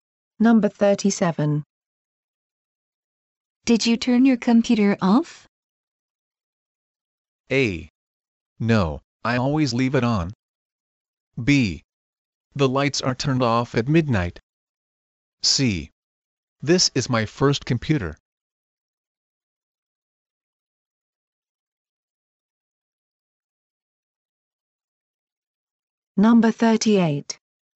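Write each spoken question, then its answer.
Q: Did you turn your computer off?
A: A: No, I always leave it on.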